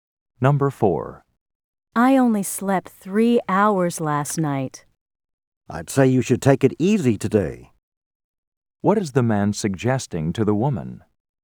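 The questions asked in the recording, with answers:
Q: What is the man suggesting to the woman?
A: She should rest and take it easy today.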